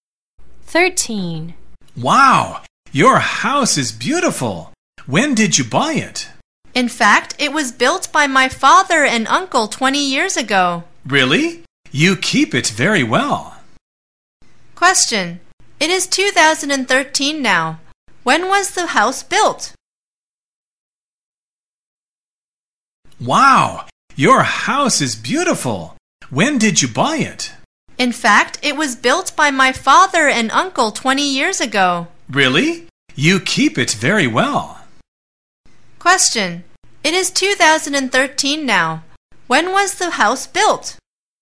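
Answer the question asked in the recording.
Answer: In 1993 (20 years ago)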